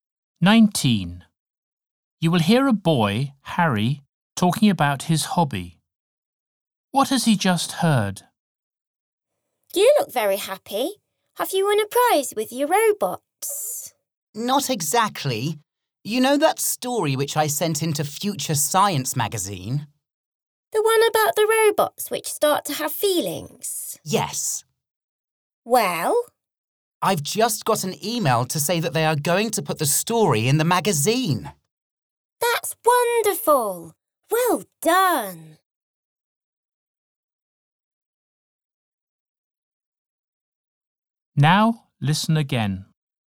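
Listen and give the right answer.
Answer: His story will be published in the magazine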